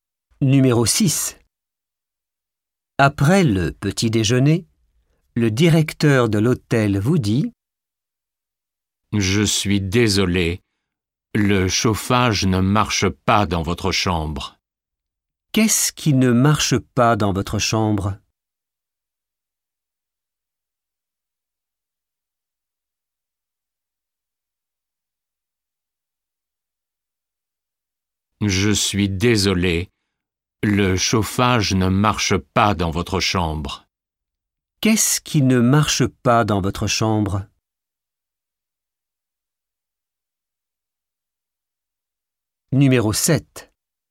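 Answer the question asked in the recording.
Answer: Le chauffage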